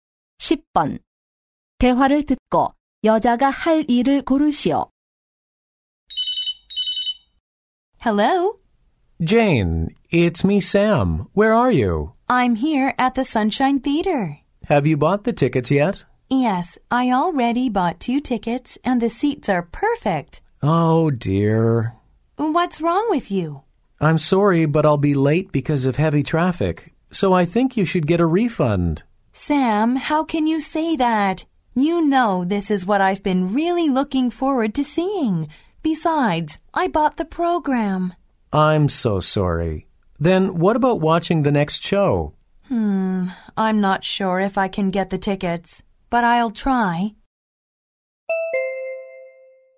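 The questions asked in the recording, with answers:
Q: 대화를 듣고 여자가 할 일을 고르시오.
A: 다음 공연 표로 바꾸기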